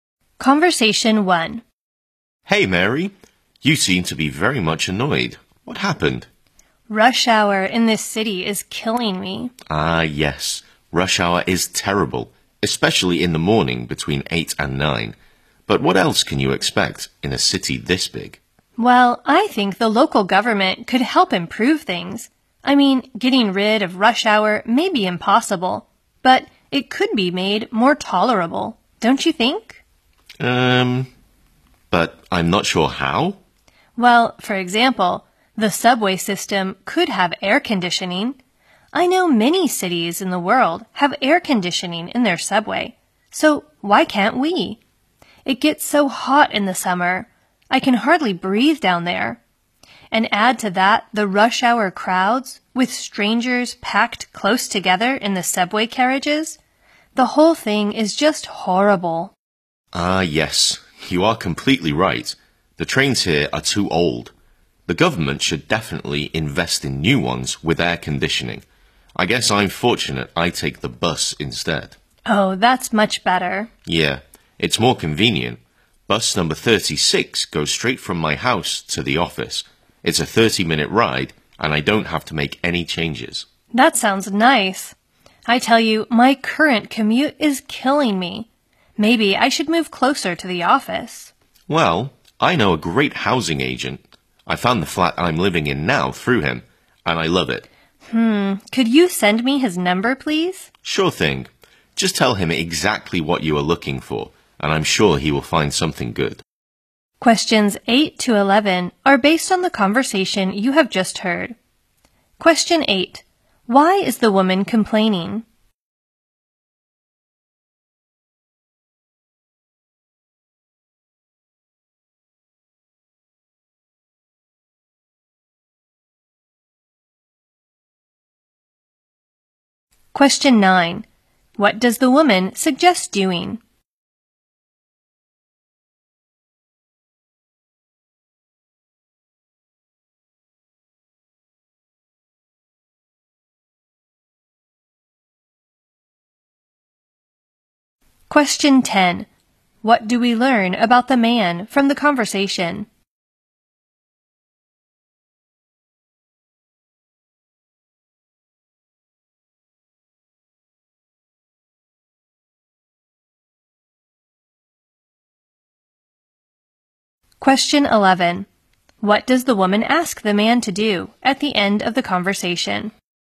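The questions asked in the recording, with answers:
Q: Why is the woman complaining?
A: Rush hour in the city is terrible.

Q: What does the woman ask the man to do at the end of the conversation?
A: Send her the housing agent's number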